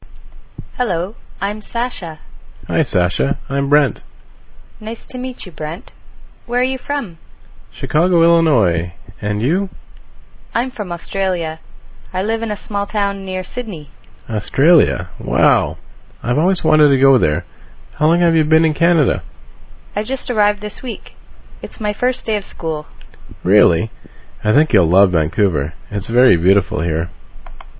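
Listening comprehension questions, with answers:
Listen and fill in the gaps (audio source: englishclub.com))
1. A: Nice to meet you Brent. are you from?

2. A: I'm Australia. I in a small town near Sydney.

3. B: Australia. Wow. I've always to go there. have you been in Canada?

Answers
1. Where
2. from; live
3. wanted; How long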